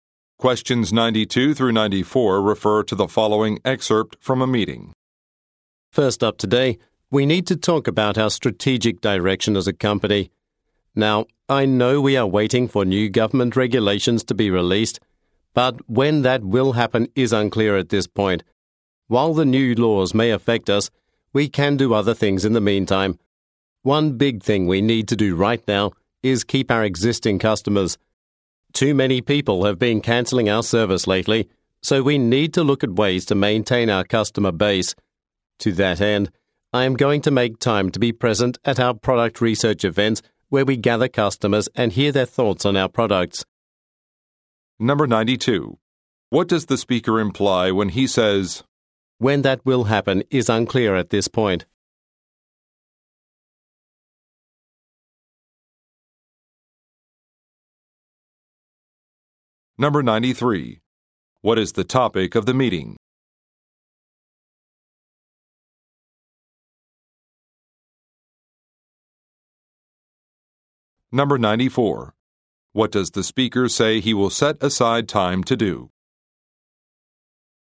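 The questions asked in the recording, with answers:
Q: What is the topic of the meeting?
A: The company's strategic direction, keeping existing customers

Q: What does the speaker say he will set aside time to do?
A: Attend product research events with customers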